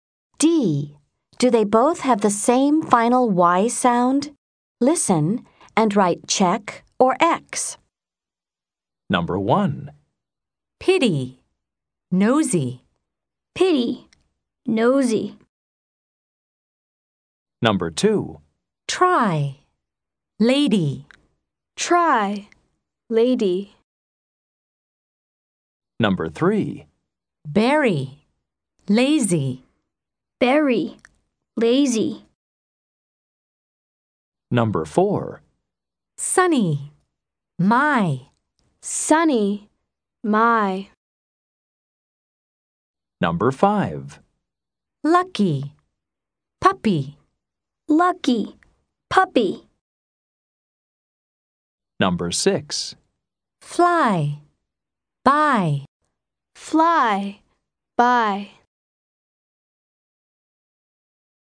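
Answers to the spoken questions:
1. Yes (check)
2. No (X)
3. Yes (check)
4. No (X)
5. Yes (check)
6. Yes (check)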